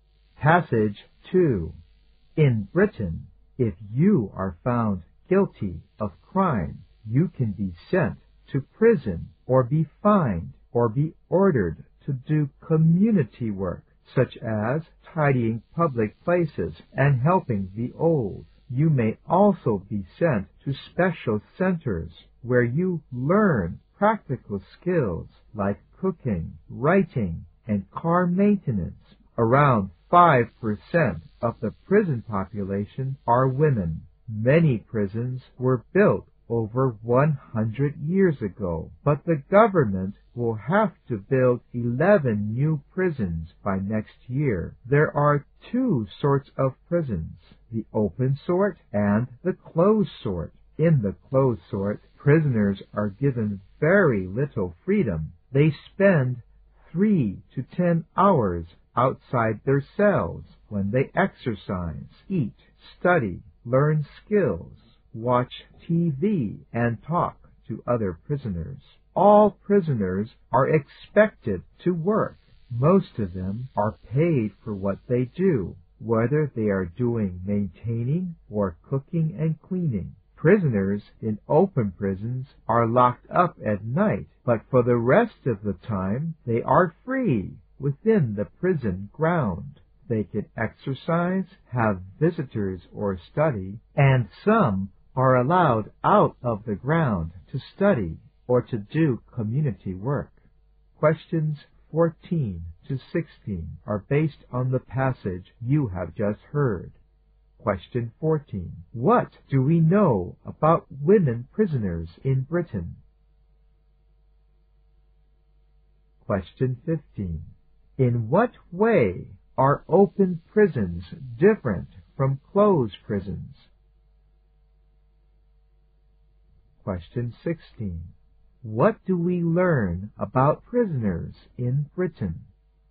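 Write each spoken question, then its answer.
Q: What do we know about women prisoners in Britain?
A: They are about 5% of the prison population.

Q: In what way are open prisons different from closed prisons?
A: In open prisons, prisoners are locked up only at night and are free within the prison grounds the rest of the time.

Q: What do we learn about prisoners in Britain?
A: All prisoners are expected to work, and most are paid.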